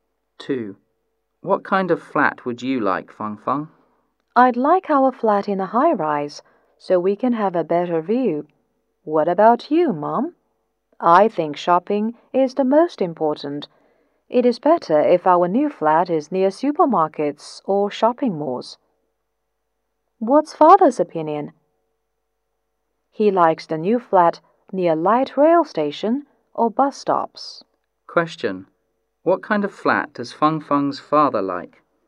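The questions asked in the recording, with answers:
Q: What kind of flat does Feng Feng's father like?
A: A flat near a light rail station or bus stops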